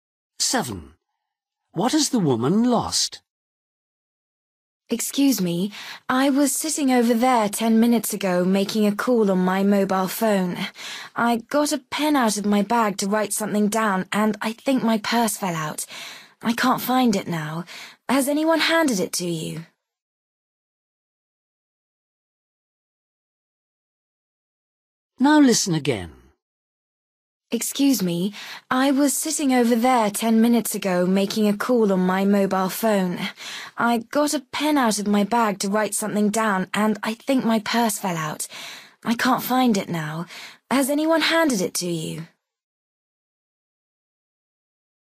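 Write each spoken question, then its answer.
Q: What has the woman lost?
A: her purse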